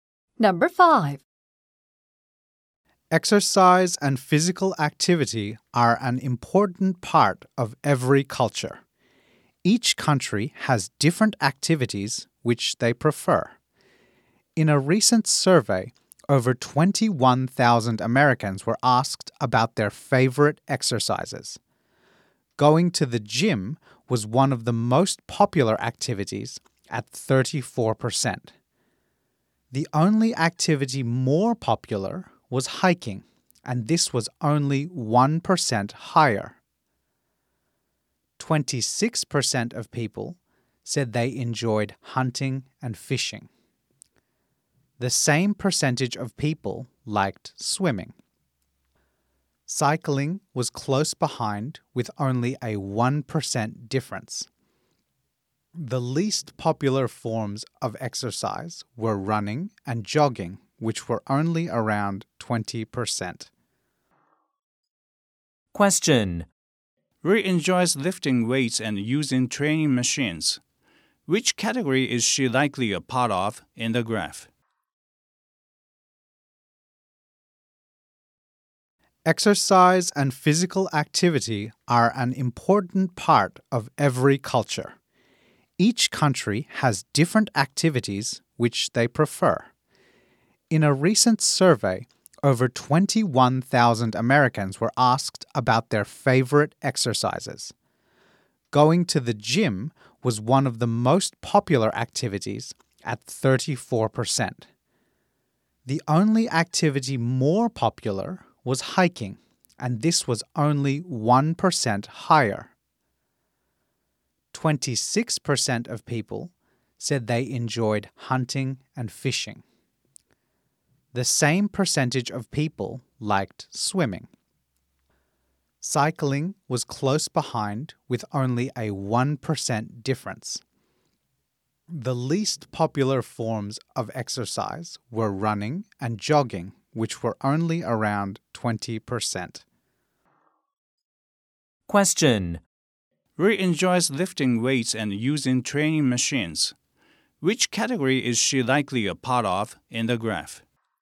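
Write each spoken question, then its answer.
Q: Which category is she likely a part of in the graph?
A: Going to the gym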